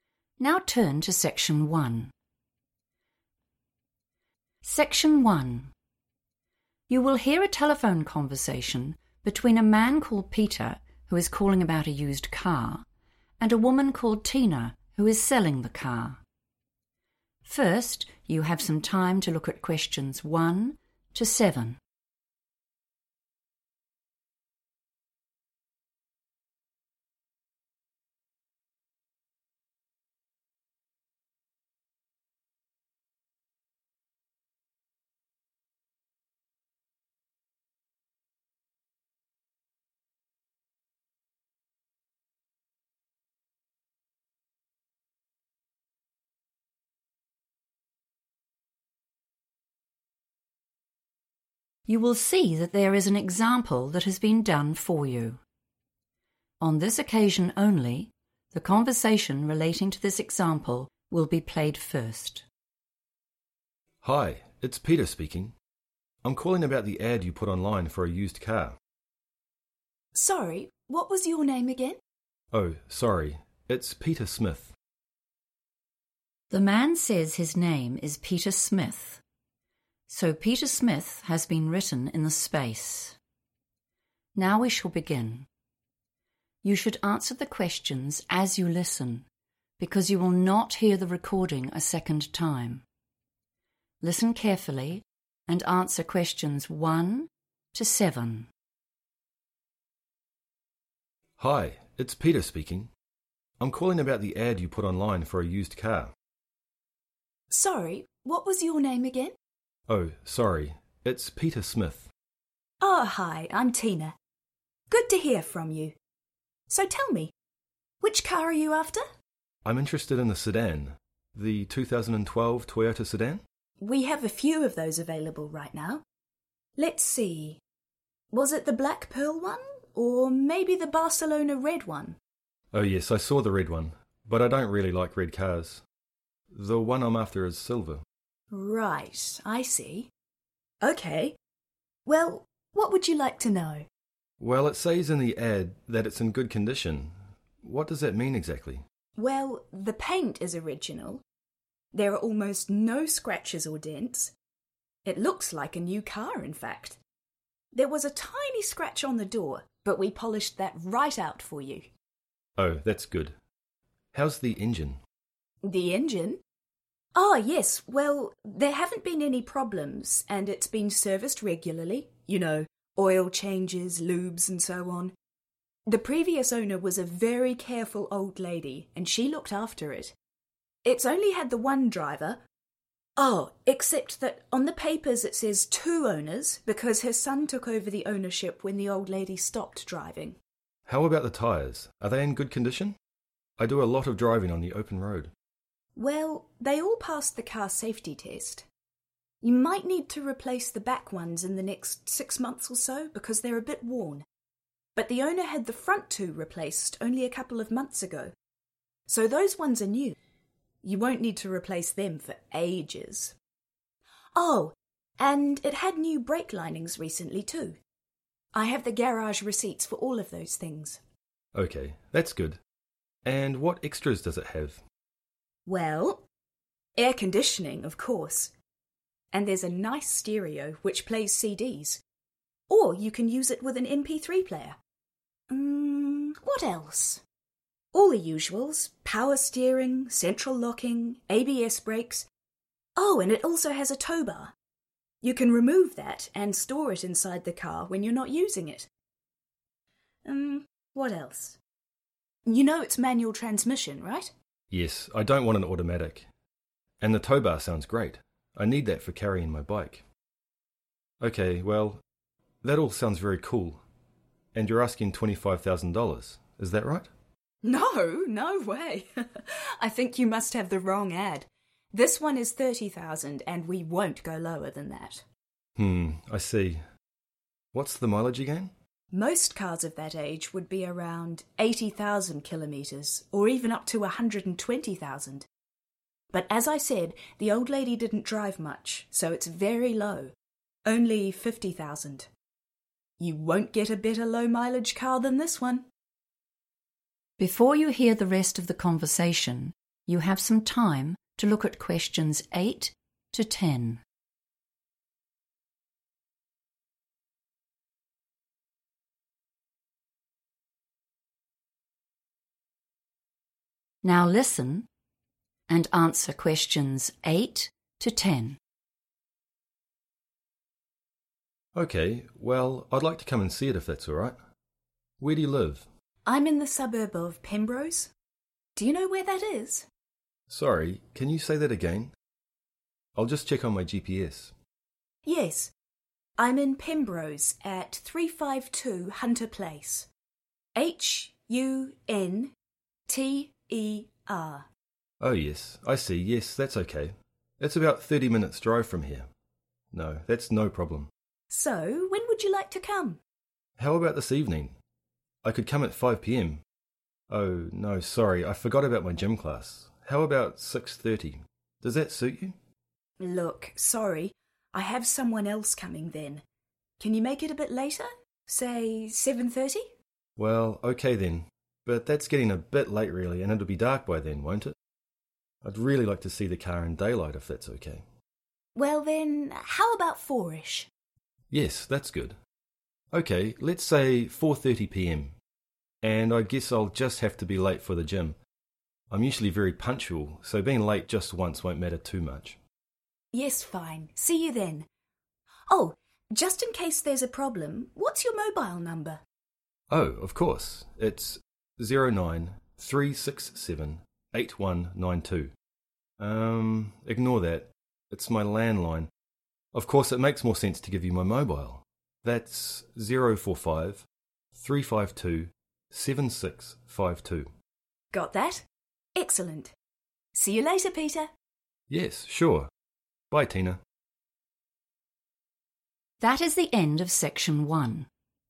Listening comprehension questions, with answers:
Complete the notes below. Write NO MORE THAN TWO WORDS AND/OR A NUMBER for each answer.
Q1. Vehicle colour:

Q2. Condition of vehicle: original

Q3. Ownership: one driver, old lady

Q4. front tyres:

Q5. Extras air conditioning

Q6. tow bar – useful for Peter's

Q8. Tina's address: 352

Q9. Time of appointment:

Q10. Peter's phone number: 045 -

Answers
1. silver
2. paint
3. two owners / 2 owners
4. new
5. stereo
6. bike / bicycle
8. Hunter Place
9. 4.30 pm / 4:30 pm / 4.30 p.m. / 4:30 p.m.
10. 352 7652

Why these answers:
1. The correct answer is silver because when Tina (the seller) suggests various car colors like black pearl or Barcelona red, Peter clarifies that he is looking for a different color. He uses the phrase 'after' to mean the car he is searching for or intends to buy is silver.
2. The correct answer is "paint" because Tina explains the condition of the car by saying the outer color is the same as when it was first bought. She uses the word "original" directly before it to describe that it is the factory-applied surface.
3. The correct answer is found when Tina describes the car's ownership history. She mentions that although it only had one driver (an old lady), the official paperwork shows 'two owners' because her son took over the title when she could no longer drive. This fits the 'Ownership' category in the notes.
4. The correct answer is "new" because Tina, the seller, explains that the previous owner changed the front two tires just two months ago. This means they are not old or damaged like the back tires, which she says are worn.
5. The correct answer is "stereo" because when Peter asks about the "extras" (special features) the car has, Tina starts listing them. She mentions air conditioning first and then immediately introduces the stereo as the next feature. This matches the order of the items in the notes.
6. The correct answer is bike because Peter explicitly mentions that he needs the car's tow bar to carry his bike. In the conversation, Tina lists the features of the car, including a tow bar. Peter responds positively, saying it is 'great' for his specific need. The word 'carrying' in the transcript is a synonym for moving or transporting something from one place to another.
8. The correct answer is Hunter Place because when Peter asks where Tina lives so he can visit, she gives her exact address. She states that she lives in the suburb of Pembrose at house number 352 on a street called Hunter Place, even spelling out 'Hunter' for him.
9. The correct answer is 4.30 pm because Peter specifically suggests this time. Earlier, they discussed meeting at 7:30 pm, but Peter wanted to see the car in daylight. When Tina suggests meeting around 4:00 (4-ish), Peter agrees and sets the final appointment for 4:30 pm, even though he will be slightly late for his gym class.
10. The correct answer is determined by listening to Peter provide his phone number. When Tina asks for a mobile number, Peter first gives a landline number starting with 09 but immediately tells Tina to ignore it. He then provides his mobile number, which starts with 045. Because the notes already provide '045 -' as the beginning of the number, the missing part to be filled in is the remaining sequence of digits he says: 352 7652.

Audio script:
MAN: Hi, It's Peter speaking. I'm calling about the ad you put online for a used car?
WOMAN: Sorry, what was your name again?
MAN: Oh, sorry, it's Peter Smith.
The man says his name is Peter Smith, so Peter Smith has been written in the space. Now we shall begin. You should answer the questions as you listen because you will not hear the recording a second time. Listen carefully and answer questions 1 to 7.
Tina: Ah, hi, I'm Tina. Good to hear from you. So tell me, which car are you after?
Peter: I'm interested in the sedan, the 2012 Toyota sedan.
Tina: We have a few of those available right now. Let's see, was it the black pearl one? Or maybe the Barcelona red one?
Peter: Oh yes, I saw the red one, but I don't really like red cars. The one I'm after is silver.
Tina: Right, I see ... OK, well, what would you like to know?
Peter: Well, it says in the ad that it's in good condition. What does that mean, exactly?
Tina: Well, the paint is original, there are almost no scratches or dents. It looks like a new car, in fact. There was a tiny scratch on the door, but we polished that right out for you.
Peter: Oh, that's good. How's the engine?
Tina: The engine? Oh, yes, well, there haven't been any problems, and it's been serviced regularly, you know, oil changes, lubes and so on. The previous owner was a very careful old lady, and she looked after it. It's only had the one driver; oh, except that on the papers it says two owners, because her son took over the ownership when the old lady stopped driving.
Peter: How about the tyres? Are they in good condition? I do a lot of driving on the open road.
Tina: Well, they all passed the car safety test. You might need to replace the back ones in the next 6 months or so, because they're a bit worn, but the owner had the front two replaced only a couple of months ago, so those ones are new. You won't need to replace them for ages. Oh ... and it had new brake linings recently, too. I have the garage receipts for all those things.
Peter: OK ... that's good ... and what extras does it have?
Tina: Well, air conditioning of course, and there's a nice stereo which plays CDs or you can use it with an mp3 player. Umm, what else? All the usuals, power steering, central locking, ABS brakes, oh, and it also has a tow bar. You can remove that and store it inside the car when you're not using it. Um, what else? You know it's manual transmission, right?
Peter: Yes, I don't want an automatic, and the tow bar sounds great, I need that for carrying my bike. Ok, well, that all sounds very cool. And you're asking 25,000 dollars, is that right?
Tina: No, no way! I think you must have the wrong ad. This one is 30,000, and we won't go lower than that.
Peter: Hmm, I see ... What's the mileage again?
Tina: Most cars of that age would be around 80,000 km or even up to 120,000 but as I said the old lady didn't drive much so it's very low, only 50,000. You won't get a better low-mileage car than this one.
Before you hear the rest of the conversation, you have some time to look at questions 8 to 10.
Now listen and answer questions 8 to 10.
Peter: OK ... well, I'd like to come and see it if that's all right. Where do you live?
Tina: I'm in the suburb of Pembrose. Do you know where that is?
Peter: Sorry, can you say that again? I'll just check on my GPS.
Tina: Yes, I'm in Pembrose, at 352 Hunter Place. H...U...N...T...E...R
Peter: Oh yes, I see, yes that's OK, it's about 30 minutes' drive from here. No, that's no problem.
Peter: How about this evening? I could come at 5 pm ... oh, no ... sorry I forgot my gym class, how about 6.30? Does that suit you?
Tina: Look, sorry, I have someone else coming then. Can you make it a bit later? Say, 7.30?
Peter: Well, OK then, but that's getting a bit late really and it'll be dark by then, won't it? I'd really like to see the car in daylight, if that's OK.
Tina: Well then, how about 4-ish?
Peter: Yes that's good. OK, let's say 4.30 pm, and I guess I'll just have to be late for the gym. I'm usually very punctual, so being late just once won't matter too much.
Tina: Yes, fine, see you then. Oh, just in case there's a problem, what's your mobile number?
Peter: Oh, of course. Um, ignore that ... it's my landline. Of course it makes more sense to give you my mobile. That's 045 – 3-5-2-7-6-5-2
Tina: Got that! Excellent. See you later, Peter.
Peter: Yes, sure. Bye, Tina.
That is the end of section 1. You now have half a minute to check your answers.